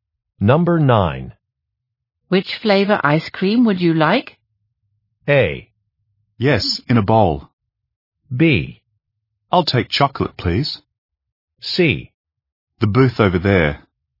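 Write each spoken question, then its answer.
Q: Which flavor ice cream would you like?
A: B: I'll take chocolate, please.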